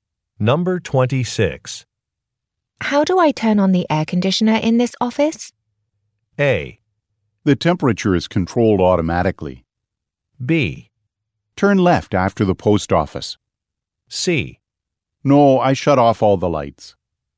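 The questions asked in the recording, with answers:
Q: How do I turn on the air conditioner in this office?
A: A: The temperature is controlled automatically.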